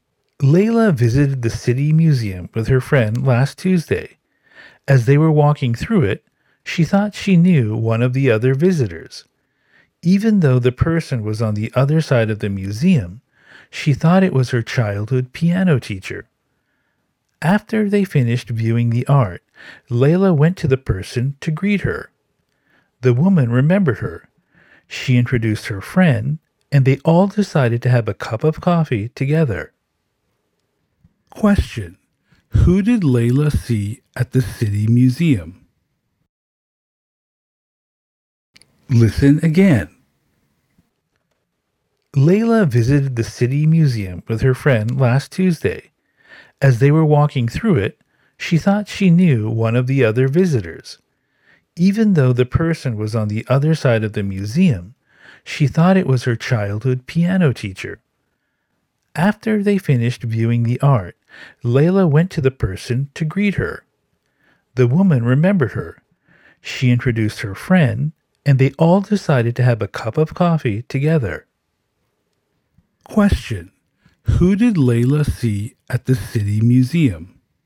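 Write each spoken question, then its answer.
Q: Who did Layla see at the city museum?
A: Her childhood piano teacher.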